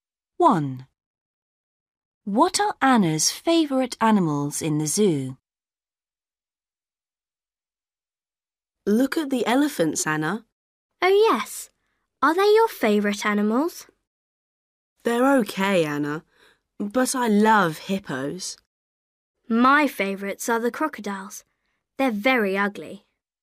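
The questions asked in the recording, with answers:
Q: What are Anna's favourite animals in the zoo?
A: crocodiles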